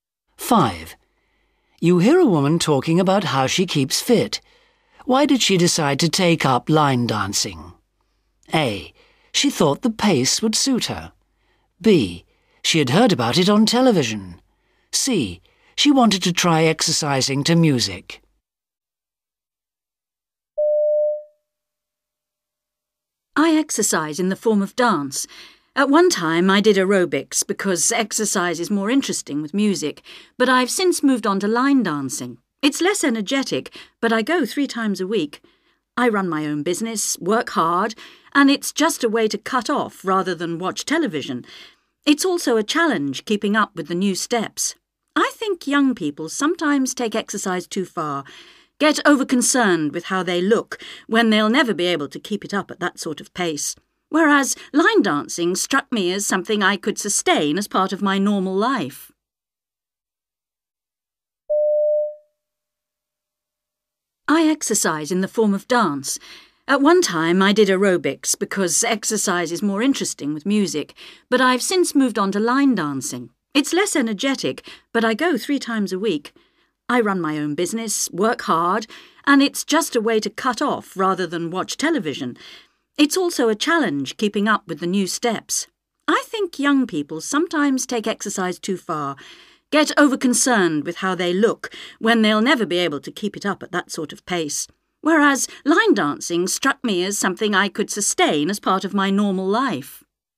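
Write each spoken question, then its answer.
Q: Why did she decide to take up line dancing?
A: A: She thought the pace would suit her.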